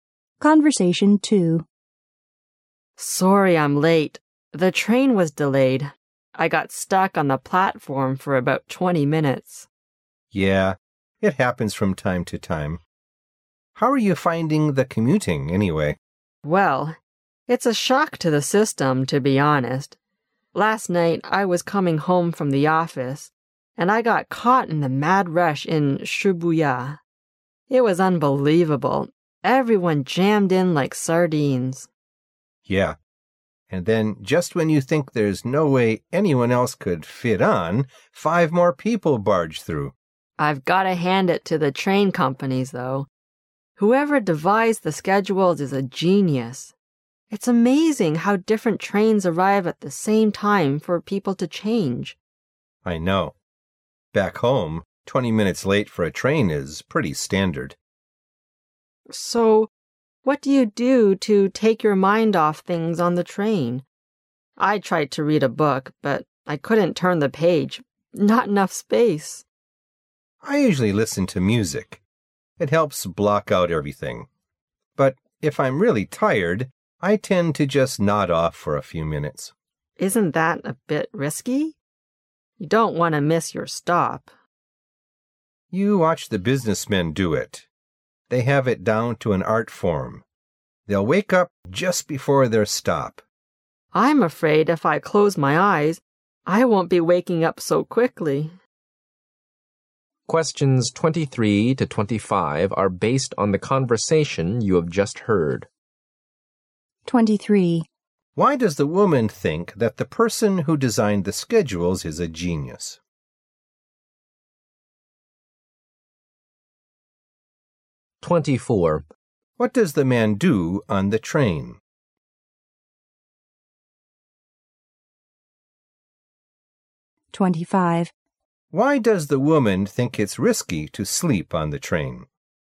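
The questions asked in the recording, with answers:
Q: Why does the woman think that the person who designed the schedules is a genius?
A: Different trains arrive at the same time so people can change.

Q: Why does the woman think it's risky to sleep on the train?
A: You might miss your stop.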